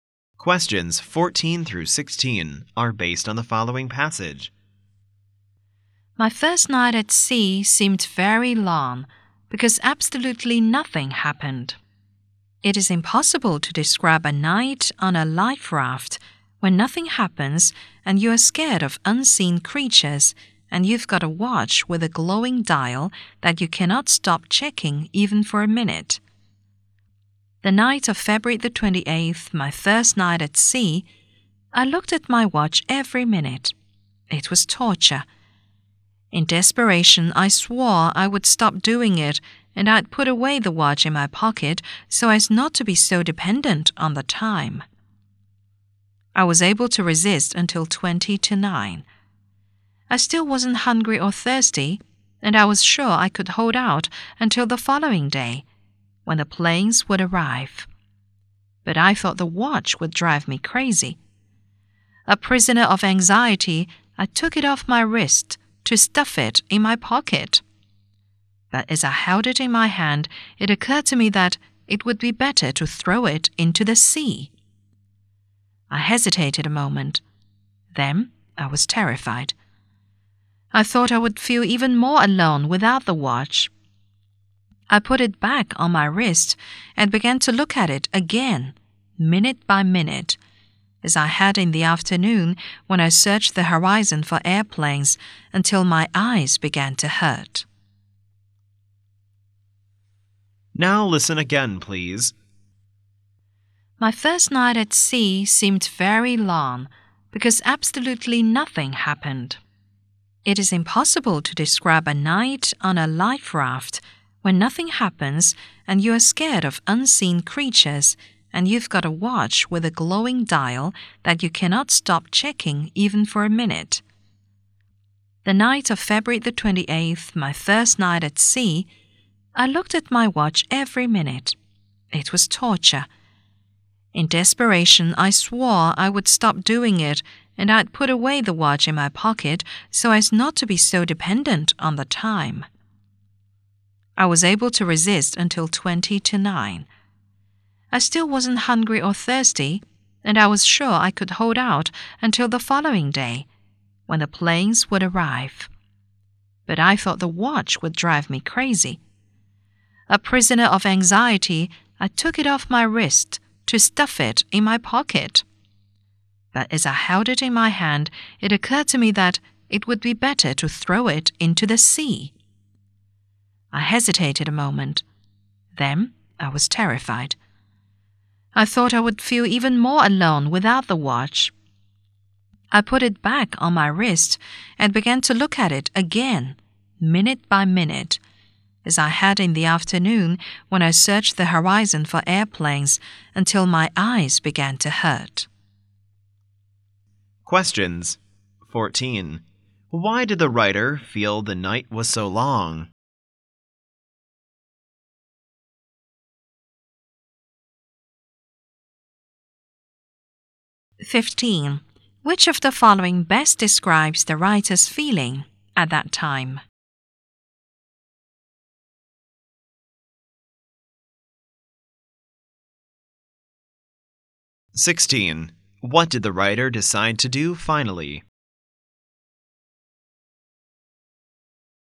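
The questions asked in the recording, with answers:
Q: Why did the writer feel the night was so long?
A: Because absolutely nothing happened

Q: What did the writer decide to do finally?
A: Put the watch back on his wrist and keep it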